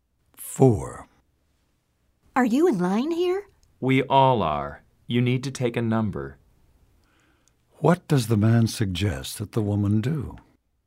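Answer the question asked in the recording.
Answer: Take a number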